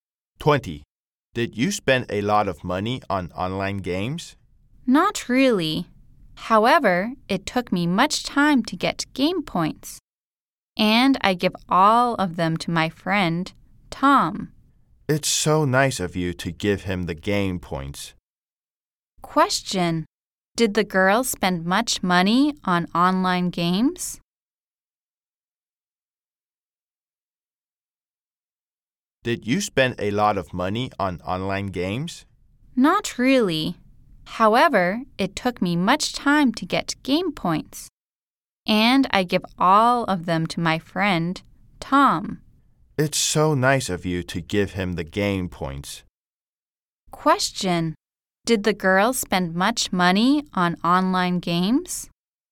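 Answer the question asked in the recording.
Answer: No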